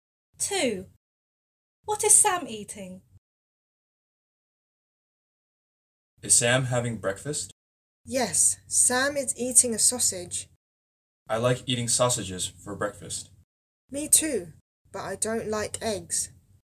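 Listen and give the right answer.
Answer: a sausage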